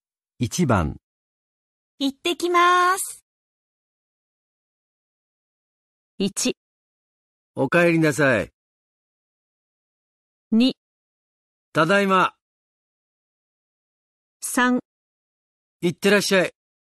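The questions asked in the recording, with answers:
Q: 行ってきます。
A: 3: 行ってらっしゃい。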